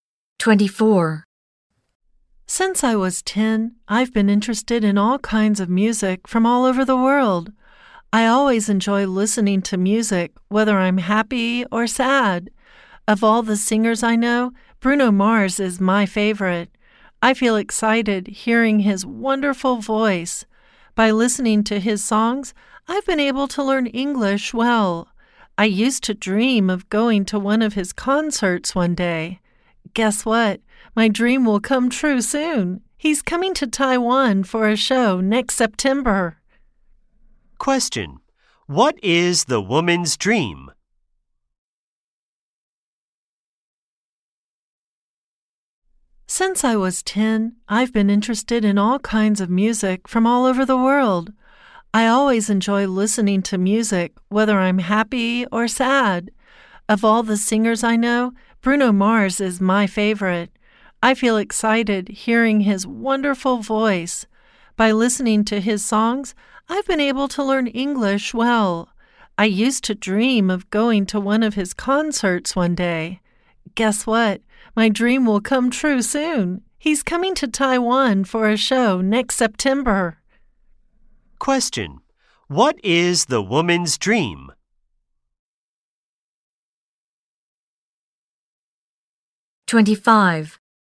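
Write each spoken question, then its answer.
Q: Question: What is the woman's dream?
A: To go to one of Bruno Mars's concerts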